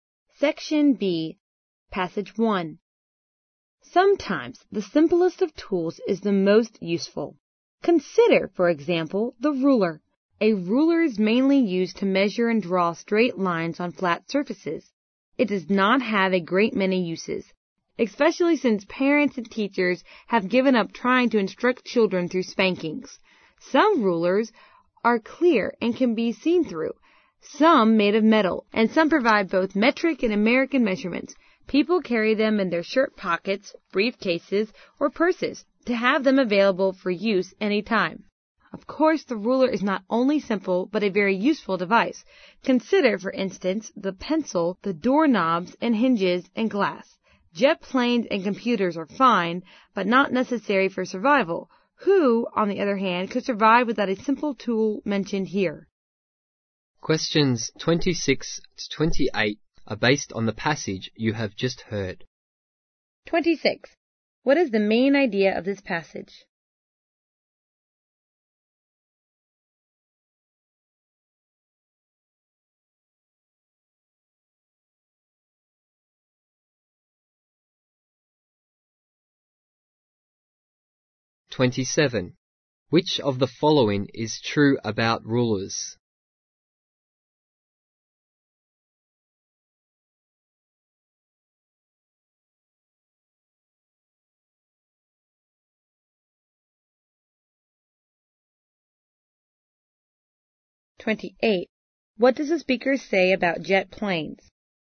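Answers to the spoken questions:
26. Simple tools are often the most useful
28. They are fine but not necessary for survival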